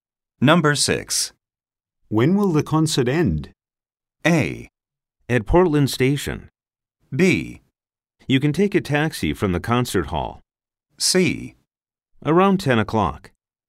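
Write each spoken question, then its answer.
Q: When will the concert end?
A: C: Around 10 o'clock.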